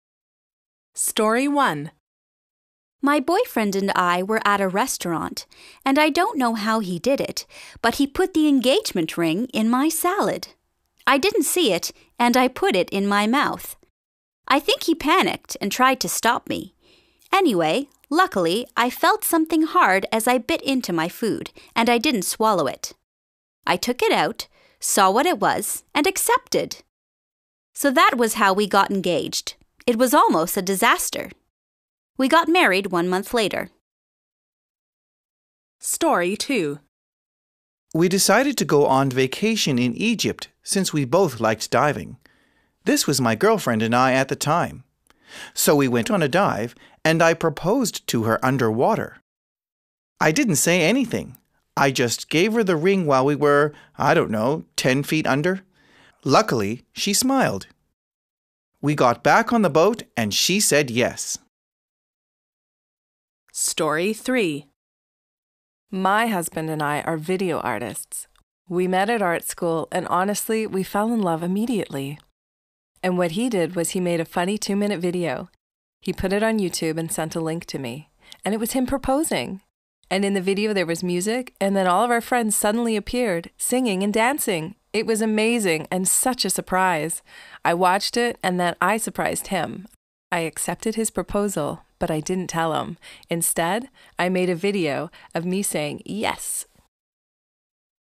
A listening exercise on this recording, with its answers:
B. Listen again and answer the questions.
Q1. In Story 1, where did the boyfriend propose?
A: in a restaurant

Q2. Why did she say, "It was almost a disaster"?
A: She put the ring in her mouth and nearly swallowed it.

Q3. In Story 2, which country were they in?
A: Egypt

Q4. What happened on the boat?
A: She said yes.

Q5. In Story 3, how did the boyfriend propose?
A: He made a two-minute YouTube video of him proposing and sent her a link.

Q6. How did she accept?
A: She made a video of herself saying yes.

C. Which stories do the sentences 1-6 come from? Use the sentences to help you re-tell the stories.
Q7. We were at a restaurant.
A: Story 1

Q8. I didn't say anything. I just gave her the ring.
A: Story 2

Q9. We met at art school.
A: Story 3

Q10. Luckily, she smiled.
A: Story 2

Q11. I accepted, but I didn't tell him.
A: Story 3

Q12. He tried to stop me.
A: Story 1

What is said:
Story 1
W1: My boyfriend and I were at a restaurant, and I don't know how he did it, but he put the engagement ring in my salad. I didn't see it, and I put it in my mouth. I think he panicked and tried to stop me. Anyway, luckily I felt something hard as I bit into my food, and I didn't swallow it. I took it out, saw what it was and accepted! So that was how we got engaged. It was almost a disaster. We got married one month later.
Story 2
M: We decided to go on vacation in Egypt, since we both liked diving. This was my girlfriend and I at the time. So we went on a dive, and I proposed to her underwater. I didn't say anything. I just gave her the ring while we were, I don't know, ten feet under. We got back on the boat, and she said yes.
Story 3
W2: My husband and I are video artists. We met at art school, and honestly we fell in love immediately. And what he did was he made a funny two-minute video. He put it on YouTube and sent a link to me. And it was him proposing. And in the video there was music, and then all of our friends suddenly appeared, singing and dancing. It was amazing and such a surprise. I watched it, and then I surprised him. I accepted his proposal, but I didn't tell him. Instead I made a video of me saying yes.